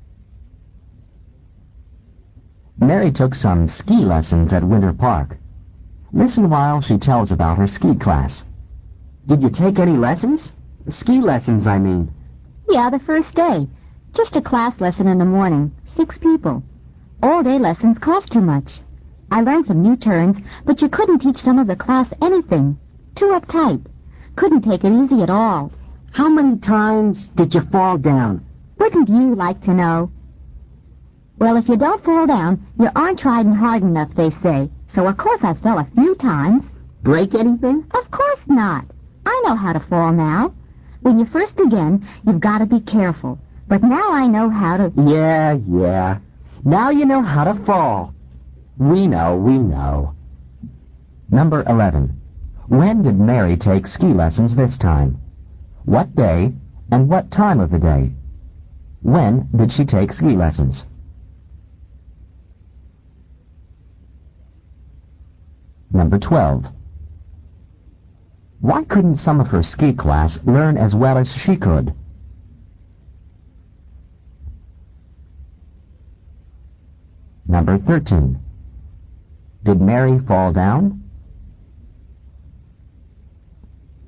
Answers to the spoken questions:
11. you should have written the first day in the morning.
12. they were too uptight, U-P-T-I-G-H-T, and couldn't take it easy at all.
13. Yes, she did.